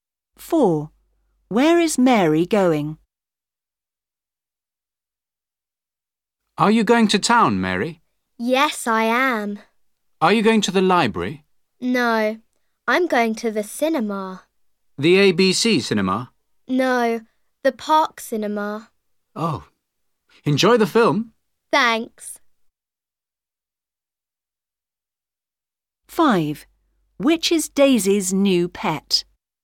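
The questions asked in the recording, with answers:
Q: Where is Mary going?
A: To the Park cinema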